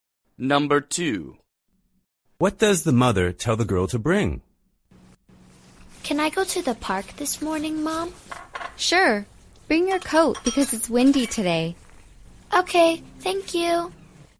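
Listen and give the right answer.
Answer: her coat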